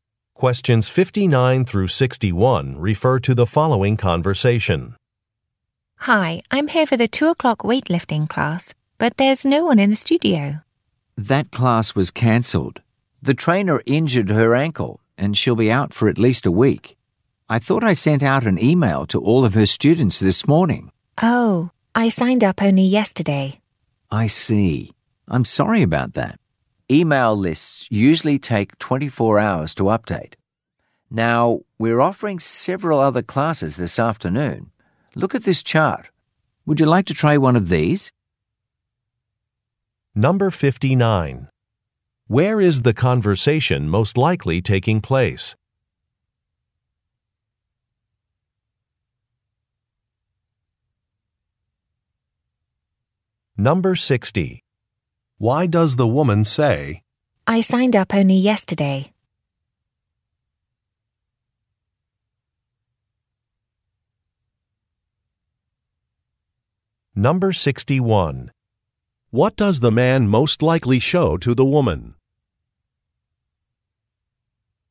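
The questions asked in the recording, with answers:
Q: Where is the conversation most likely taking place?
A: At a fitness center

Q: What does the man most likely show to the woman?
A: A chart of classes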